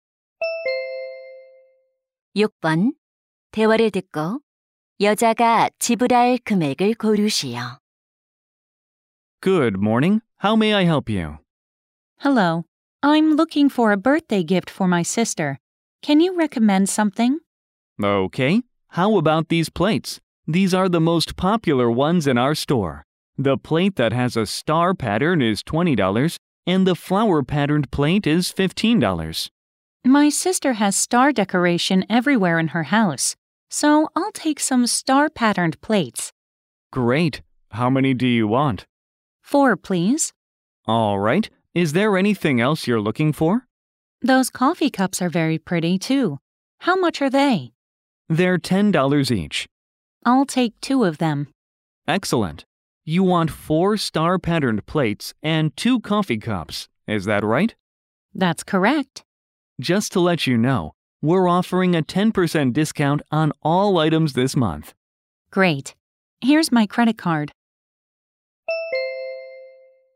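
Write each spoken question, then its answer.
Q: 대화를 듣고 여자가 지불할 금액을 고르시오.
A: $90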